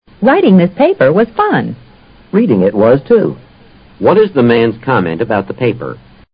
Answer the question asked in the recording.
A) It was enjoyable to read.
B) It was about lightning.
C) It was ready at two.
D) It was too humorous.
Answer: A) It was enjoyable to read.

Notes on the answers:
fun: 有乐趣的事。reading the paper was fun与it was enjoyable to read (it) 含义是相同的。